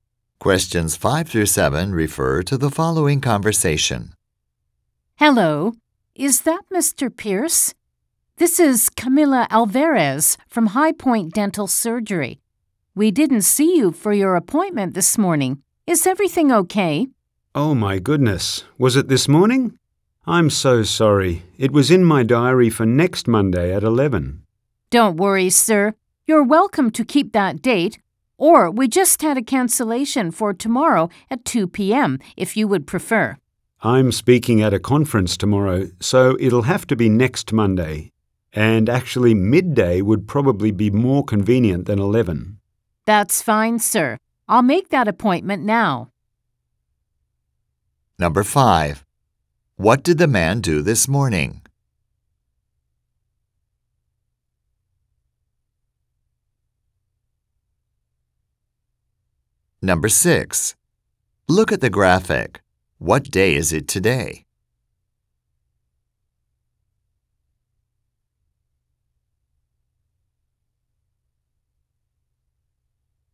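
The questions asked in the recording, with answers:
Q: What did the man do this morning?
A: He missed his dental appointment

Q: What time will the man come next Monday?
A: At midday (12 noon)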